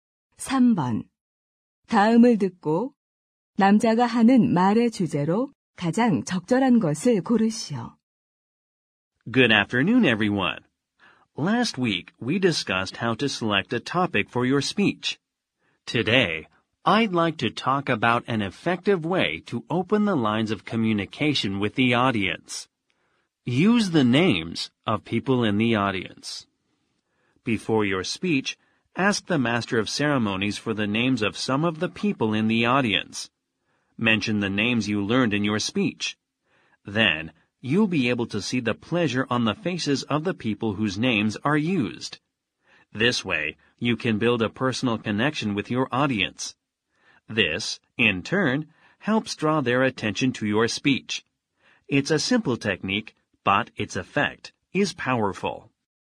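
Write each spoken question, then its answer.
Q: 다음을 듣고 남자가 하는 말의 주제로 가장 적절한 것을 고르시오.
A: 연설에서 청중의 이름을 불러 청중과 유대감을 형성하는 방법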